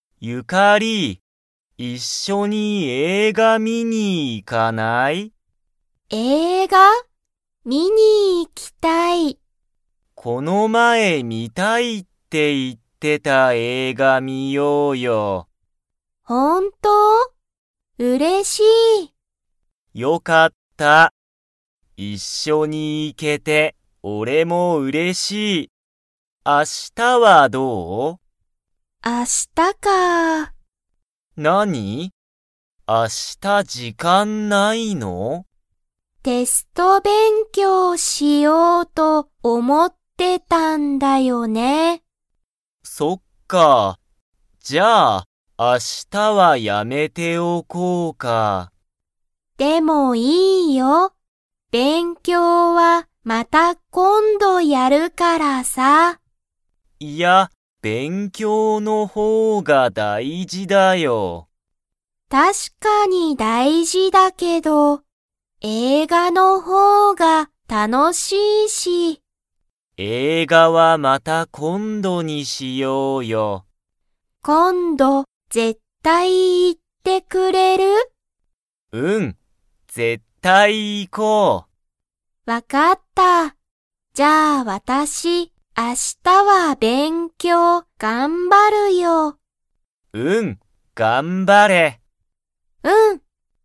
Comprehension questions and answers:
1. ハルキとユカリは、明日映画(あしたえいが)を観(み)に行(い)きますか?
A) はい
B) いいえ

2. ハルキは、勉強(べんきょう)の方(ほう)が____と思(おも)う。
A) 楽(たの)しい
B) 難(むずか)しい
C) 一緒(いっしょ)だ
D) 大事(だいじ)だ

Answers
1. B) いいえ
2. D) 大事(だいじ)だ

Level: Level 2

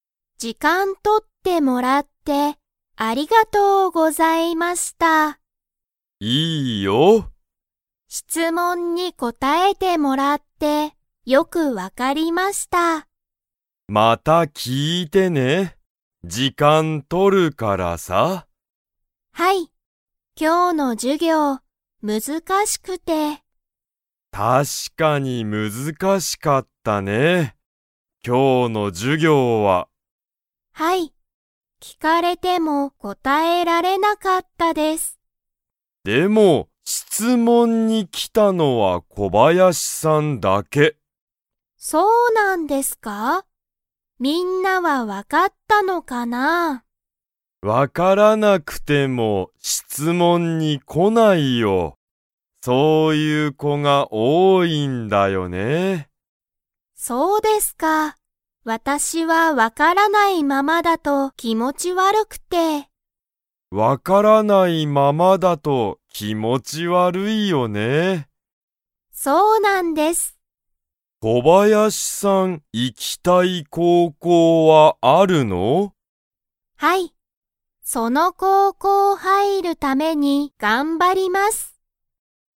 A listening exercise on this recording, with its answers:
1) 今日きょう、難むずかしかったのは何なにですか?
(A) テスト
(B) 授業じゅぎょう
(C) 仕事しごと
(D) 高校こうこう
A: (B) 授業じゅぎょう

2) 小林こばやしさんには、行いきたい高校こうこうが 。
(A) ある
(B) ない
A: (A) ある

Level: Level 3

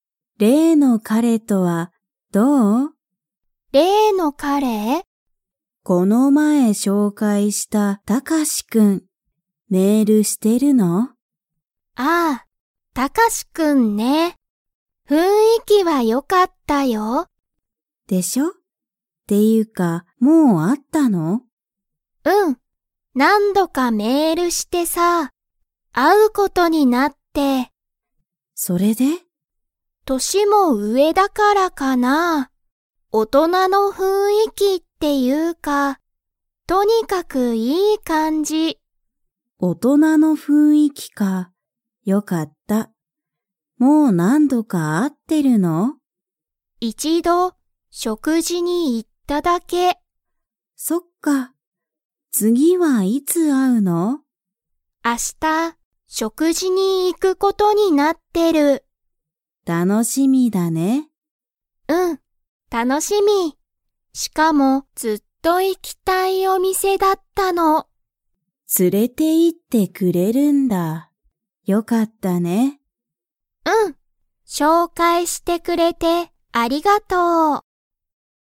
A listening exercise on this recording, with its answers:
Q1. ミユキとタカシは、何度なんどか した。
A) 紹介しょうかい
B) 電話でんわ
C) 食事しょくじ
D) メール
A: D) メール

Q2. ミユキとタカシは今日きょう、食事しょくじに行いいきますか?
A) はい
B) いいえ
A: B) いいえ

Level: Level 3

